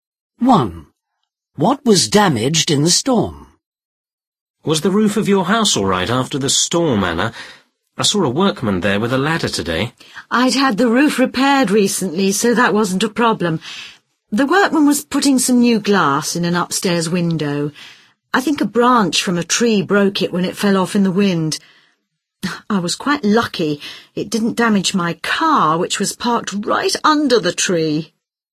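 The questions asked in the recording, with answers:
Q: What was damaged in the storm?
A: An upstairs window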